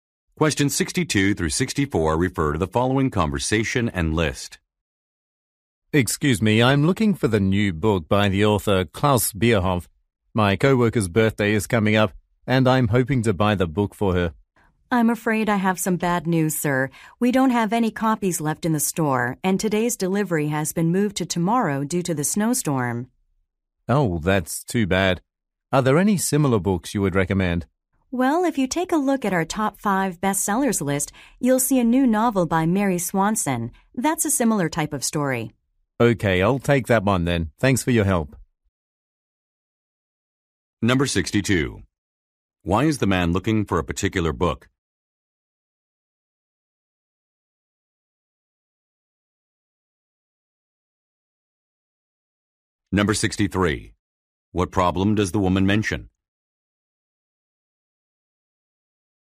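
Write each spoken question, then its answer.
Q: Why is the man looking for a particular book?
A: As a birthday gift for a co-worker

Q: What problem does the woman mention?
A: The book is out of stock and the delivery is delayed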